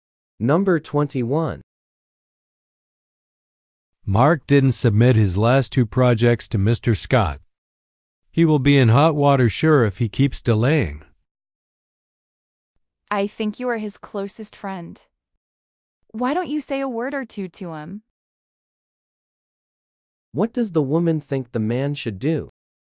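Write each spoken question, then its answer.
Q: What does the woman think the man should do?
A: Talk to Mark.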